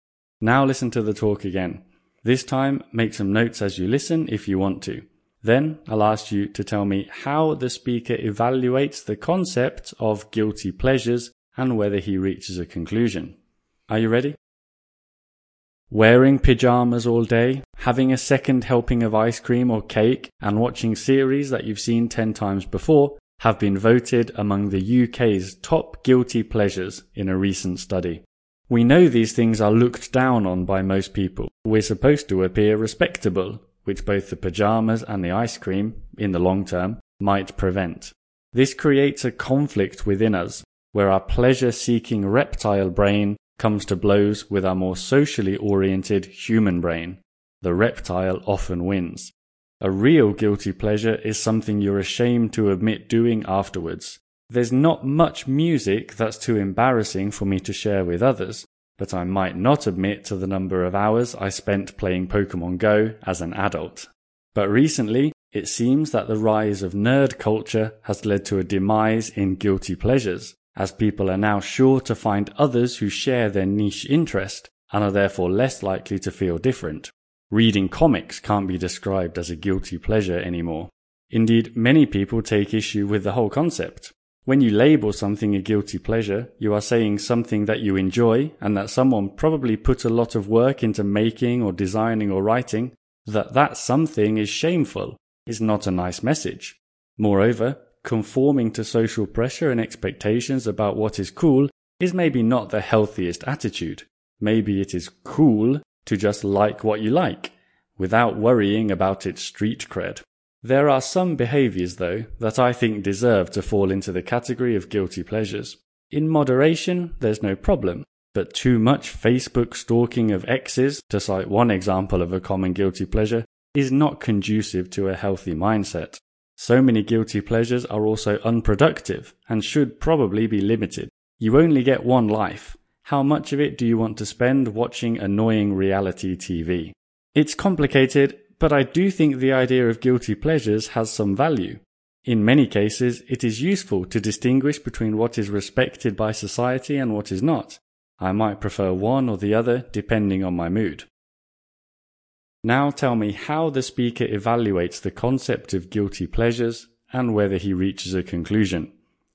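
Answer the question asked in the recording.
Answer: He weighs arguments against the concept (nerd culture, shaming what people enjoy, social conformity) against arguments for it (some behaviours are unhealthy or unproductive), and concludes it's complicated but the concept has some value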